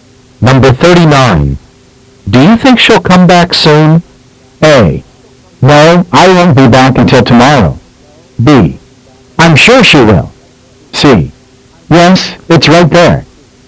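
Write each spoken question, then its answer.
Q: Do you think she'll come back soon?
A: B: I'm sure she will.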